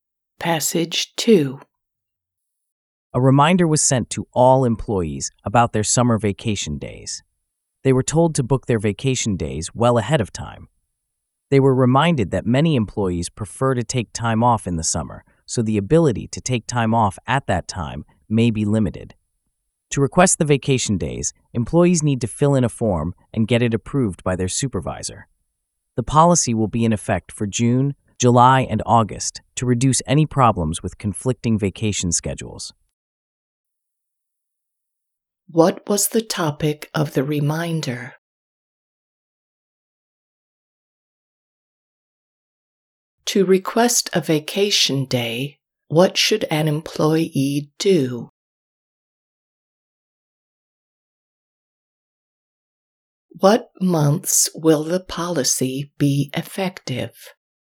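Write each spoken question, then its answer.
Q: What was the topic of the reminder?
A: Summer vacation days

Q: To request a vacation day, what should an employee do?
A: Fill in a form and get it approved by their supervisor

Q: What months will the policy be effective?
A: June, July and August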